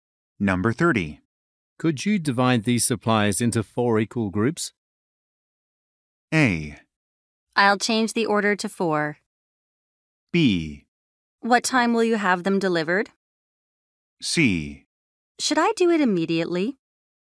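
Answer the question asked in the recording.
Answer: C: Should I do it immediately?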